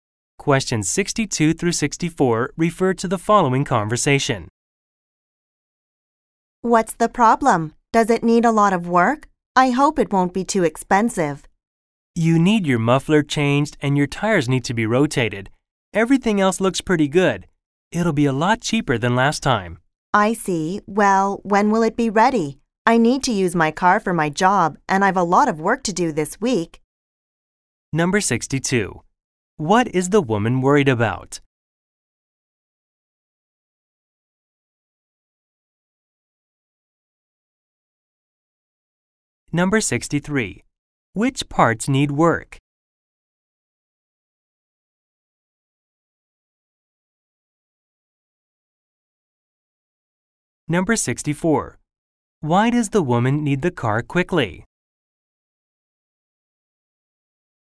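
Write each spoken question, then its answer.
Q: What is the woman worried about?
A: The cost of the repairs

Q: Which parts need work?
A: The muffler and the tires

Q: Why does the woman need the car quickly?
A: She needs it for her job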